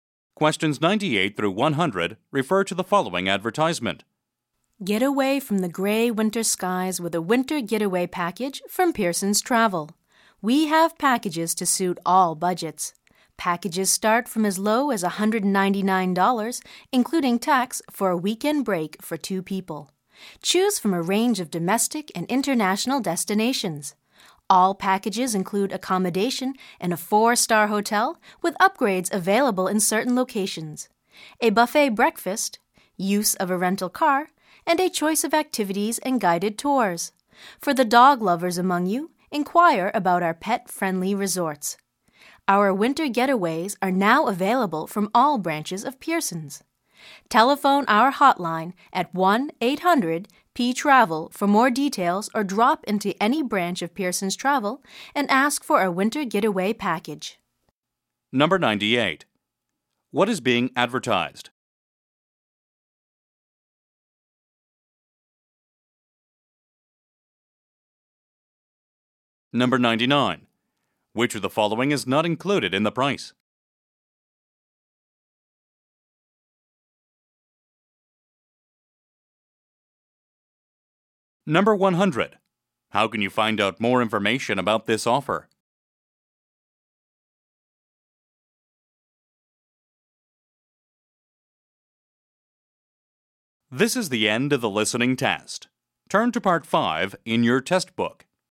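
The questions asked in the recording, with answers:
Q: What is being advertised?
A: Winter getaway travel packages

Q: How can you find out more information about this offer?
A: Call the hotline or visit a Pearson's Travel branch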